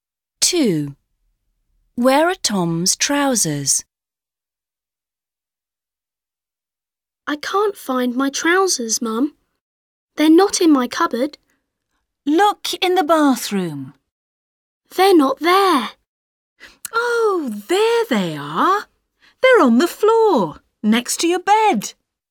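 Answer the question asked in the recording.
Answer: on the floor, next to his bed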